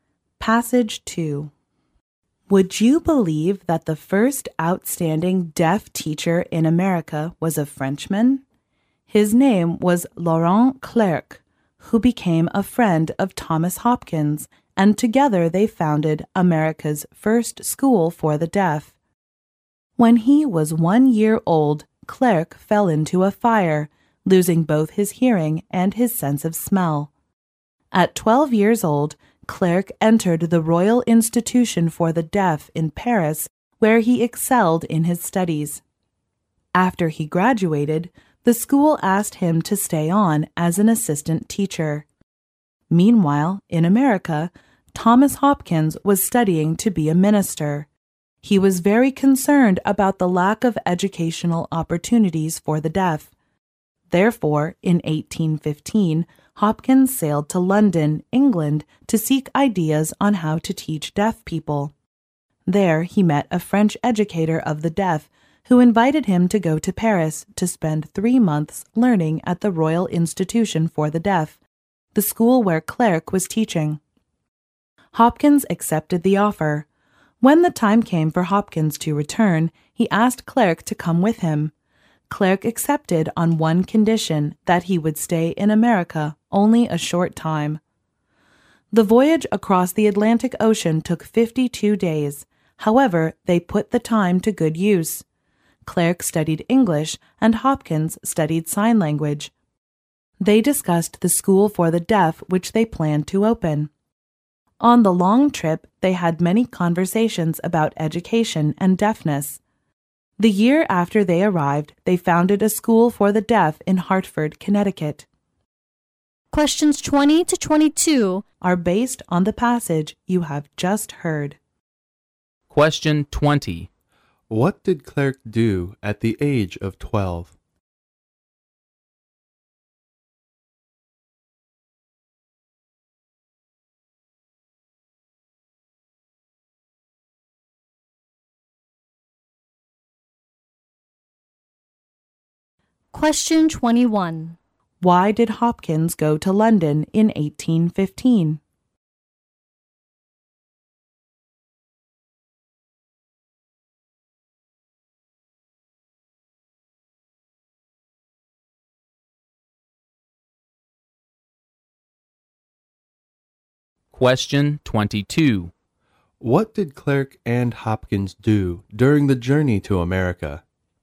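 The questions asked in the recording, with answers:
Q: What did Clerc do at the age of 12?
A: Entered the Royal Institution for the Deaf in Paris

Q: Why did Hopkins go to London in 1815?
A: To seek ideas on how to teach deaf people

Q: What did Clerc and Hopkins do during the journey to America?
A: Clerc studied English, Hopkins studied sign language, and they planned the school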